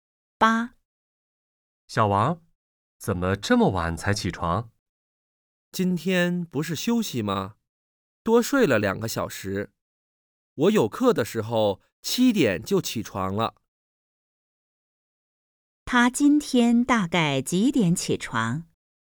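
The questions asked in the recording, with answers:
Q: 他今天大概几点起床?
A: 9点左右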